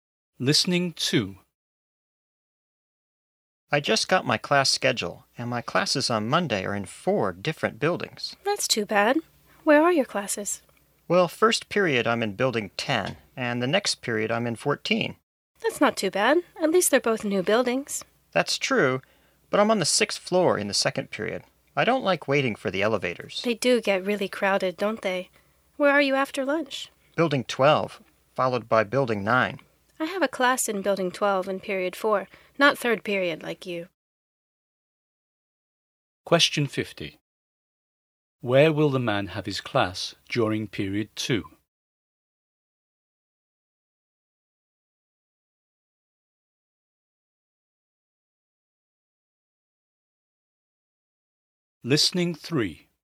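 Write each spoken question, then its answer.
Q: Where will the man have his class during period 2?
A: On the 6th floor of building 14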